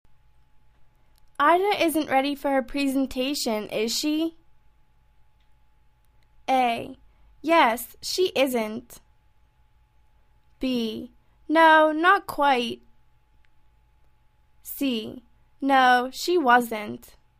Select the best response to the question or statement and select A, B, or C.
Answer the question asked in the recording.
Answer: No, not quite.